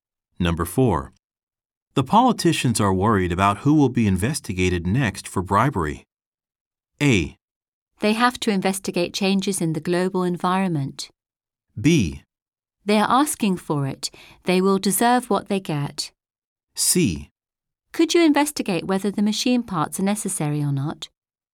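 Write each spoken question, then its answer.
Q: The politicians are worried about who will be investigated next for bribery.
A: B: They are asking for it. They will deserve what they get.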